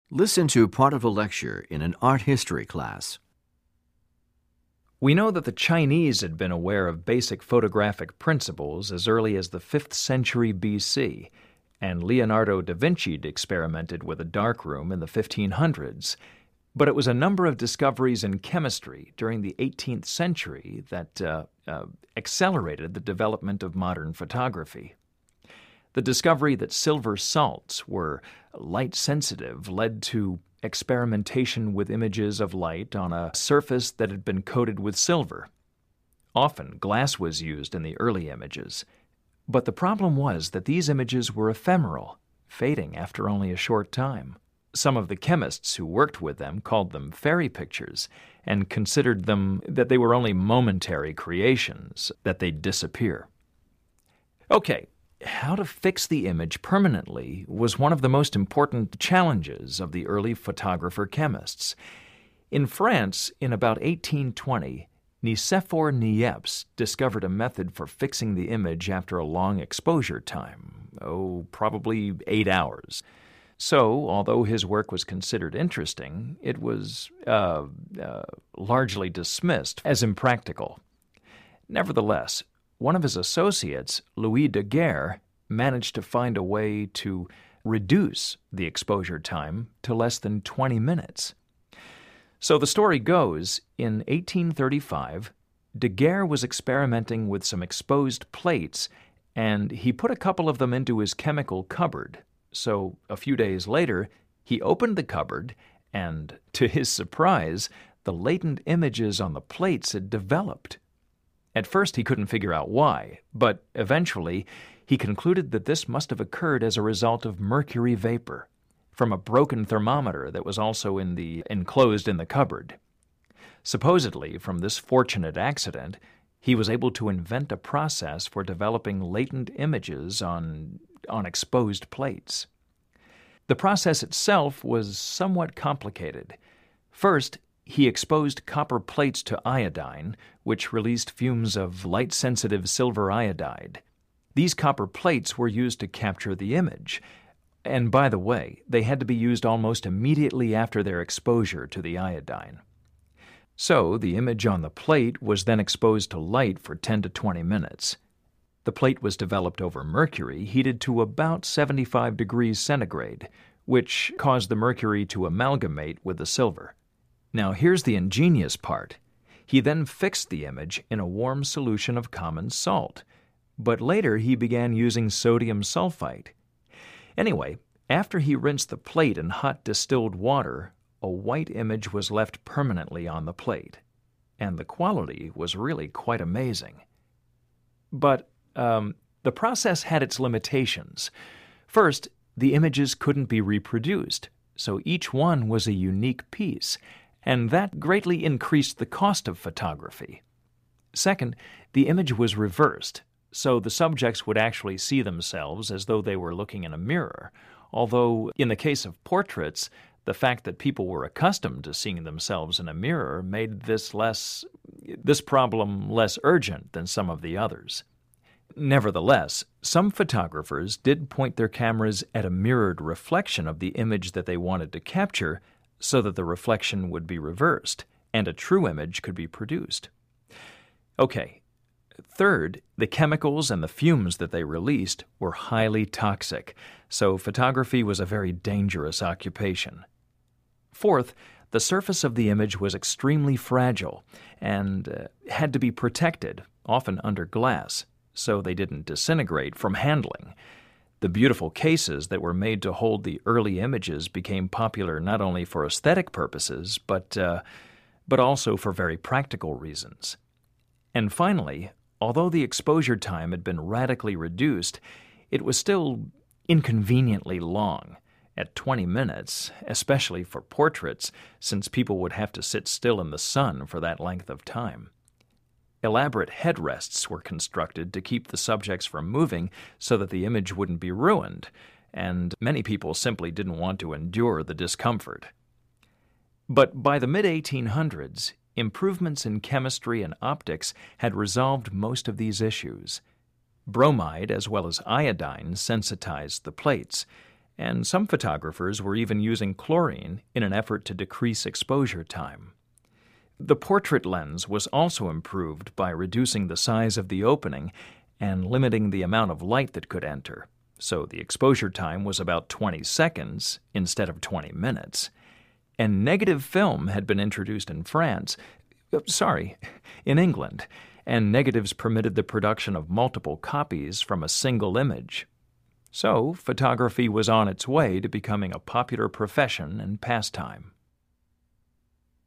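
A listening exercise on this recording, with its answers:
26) What substance was first used to fix the images?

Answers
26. A warm solution of common salt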